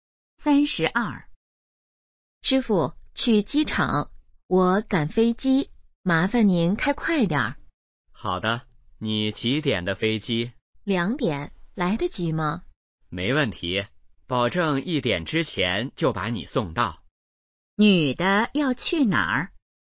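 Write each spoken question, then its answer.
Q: 女的要去哪儿?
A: 机场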